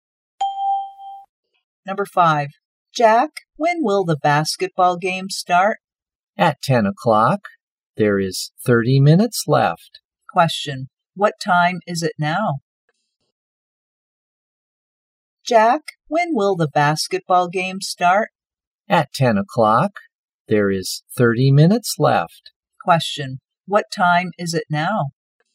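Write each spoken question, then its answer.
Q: what time is it now?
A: 9:30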